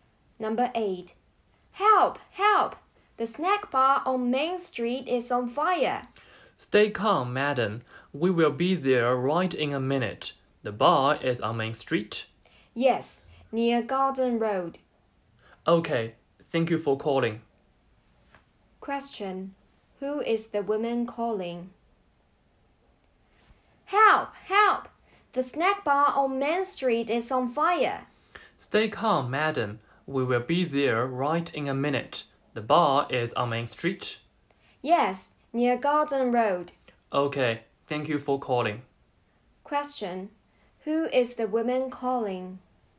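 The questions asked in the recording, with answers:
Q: who is the woman calling?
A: The fire station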